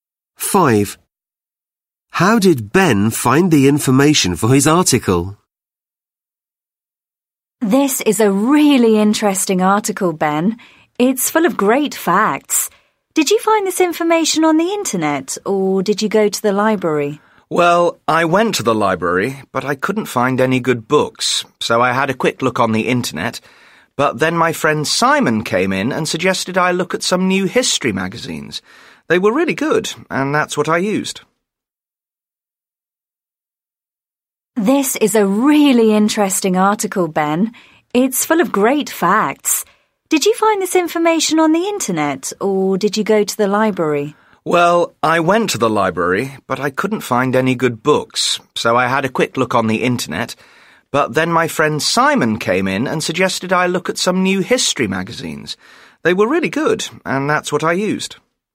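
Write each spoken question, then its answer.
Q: How did Ben find the information for his article?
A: From new history magazines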